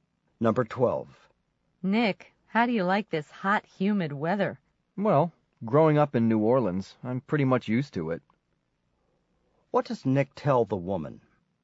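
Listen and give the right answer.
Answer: He is used to hot, humid weather because he grew up in New Orleans.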